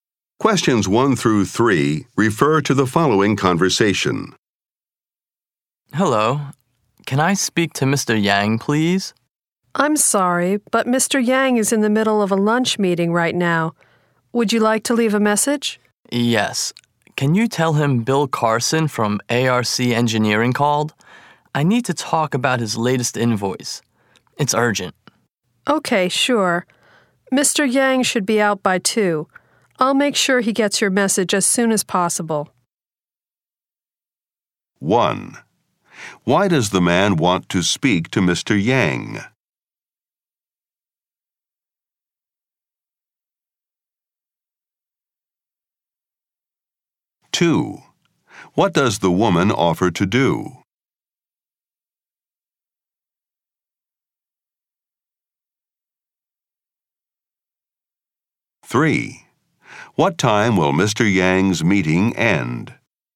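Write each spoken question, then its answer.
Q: Why does the man want to speak to Mr. Yang?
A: To talk about his latest invoice

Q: What does the woman offer to do?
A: Take a message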